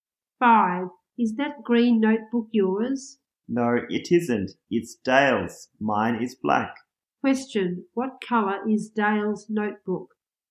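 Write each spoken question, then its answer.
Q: What colour is Dale's notebook?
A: Green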